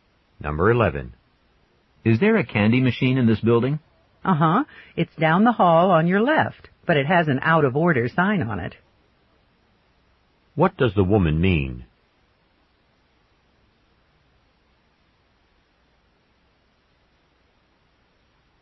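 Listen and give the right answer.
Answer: The candy machine is not working.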